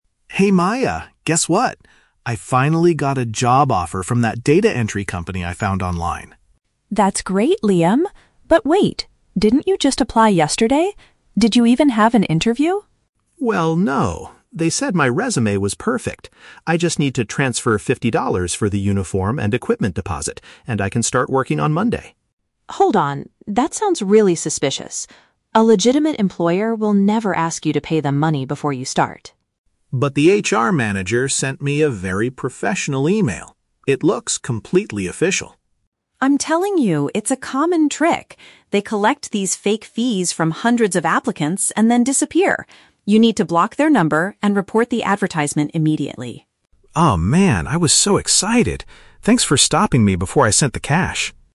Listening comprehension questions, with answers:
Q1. Why is Liam excited at the beginning of the conversation?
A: He received an employment opportunity from an internet advertisement.

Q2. What makes Maya suspicious about the situation?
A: The company is asking the applicant for an upfront financial payment.

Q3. What does Maya advise her brother to do?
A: Cut off contact with the scammers and notify others about the fake post.

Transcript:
Liam: Hey Maya, guess what? I finally got a job offer from that data entry company I found online!
Maya: That's great, Liam! But wait, didn't you just apply yesterday? Did you even have an interview?
Liam: Well, no. They said my resume was perfect. I just need to transfer fifty dollars for the uniform and equipment deposit, and I can start working on Monday.
Maya: Hold on. That sounds really suspicious. A legitimate employer will never ask you to pay them money before you start.
Liam: But the HR manager sent me a very professional email. It looks completely official.
Maya: I'm telling you, it's a common trick. They collect these fake fees from hundreds of applicants and then disappear. You need to block their number and report the advertisement immediately.